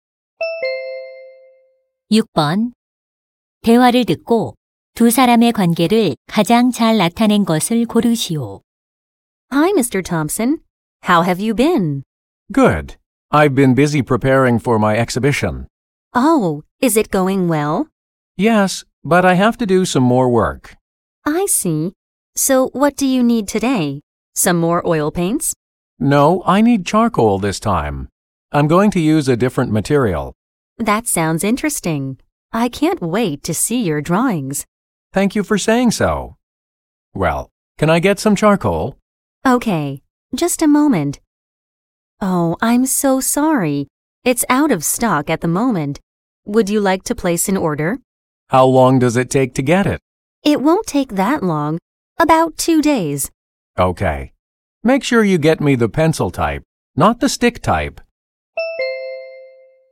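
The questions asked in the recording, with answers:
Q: 대화를 듣고 두 사람의 관계를 가장 잘 나타낸 것을 고르시오.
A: 화가 - 화방 점원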